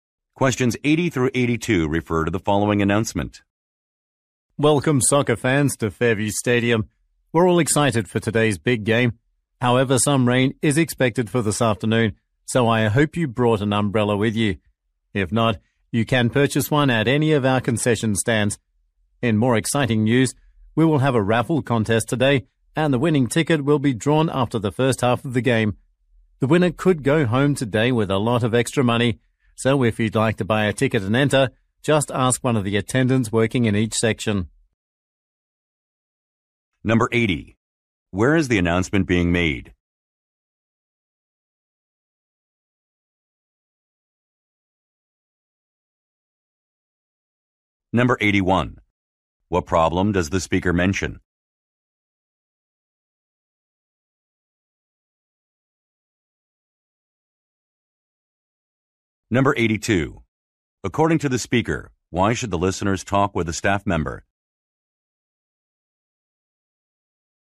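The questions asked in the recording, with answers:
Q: Where is the announcement being made?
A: At a soccer stadium

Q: What problem does the speaker mention?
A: Rain is expected

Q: According to the speaker, why should the listeners talk with a staff member?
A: To buy a raffle ticket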